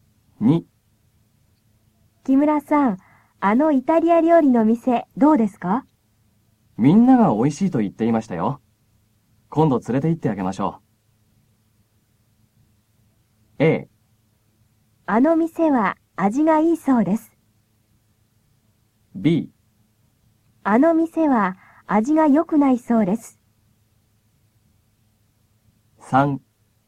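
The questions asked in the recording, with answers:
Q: あの店は味が良くないそうです。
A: A: あの店は味がいいそうです。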